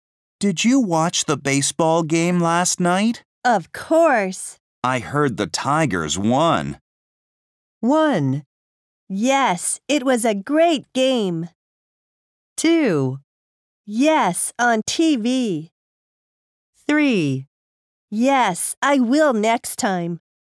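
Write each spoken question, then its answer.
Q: I heard the Tigers won.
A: 1: Yes, it was a great game.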